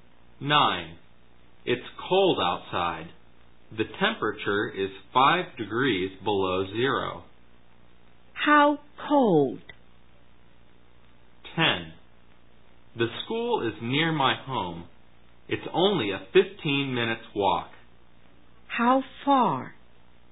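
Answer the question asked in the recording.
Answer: 5 degrees below zero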